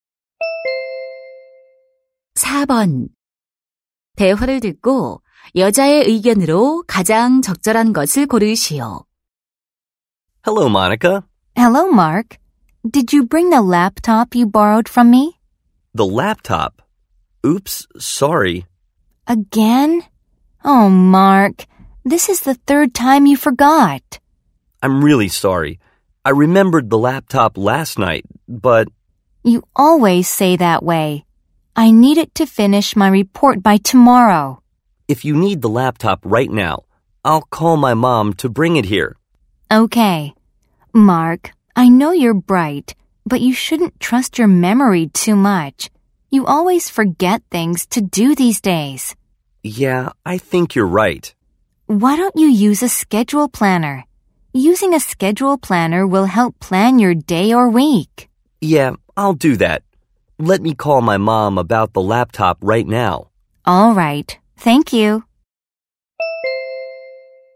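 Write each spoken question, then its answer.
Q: 대화를 듣고 여자의 의견으로 가장 적절한 것을 고르시오.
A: 기억력을 너무 믿지 말고 일정 계획표를 사용해야 한다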